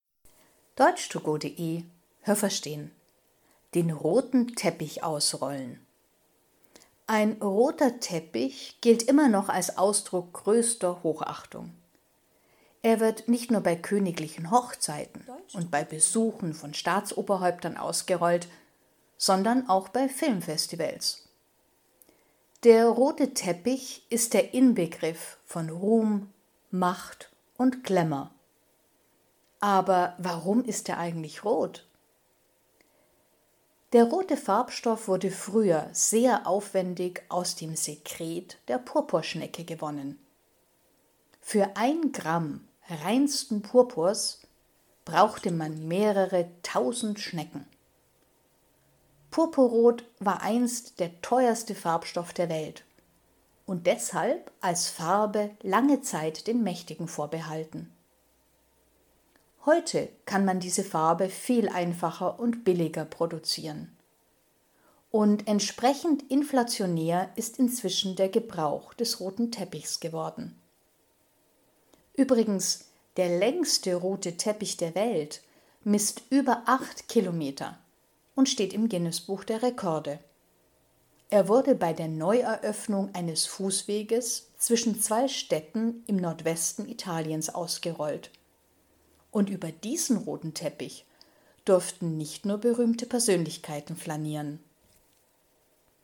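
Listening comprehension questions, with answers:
Haben Sie das gehört? Stimmt diese Aussage?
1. Der rote Teppich wird nur bei königlichen Hochzeiten und für politische Staatsgäste ausgerollt.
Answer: falsch

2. Früher stellte man die Farbe Purpurrot aus einer Flüssigkeit her, die spezielle Schnecken absondern.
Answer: richtig

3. Purpurrot war zwar früher sehr teuer, aber trotzdem haben diese Farbe damals nicht nur Mächtige benutzt.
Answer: falsch

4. Weil Purpurrot heute viel billiger produziert werden kann, gibt es heute viel mehr rote Teppiche.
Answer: richtig

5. Der längste rote Teppich der Welt lag auf einem über 8 km langen Fußweg zwischen zwei italienischen Städten.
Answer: richtig

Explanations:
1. Auch bei Filmfestivals wird ein roter Teppich ausgerollt.
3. Weil die Farbe sehr kostbar war, haben ausschließlich Mächtige sie benutzt.

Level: B (mittel)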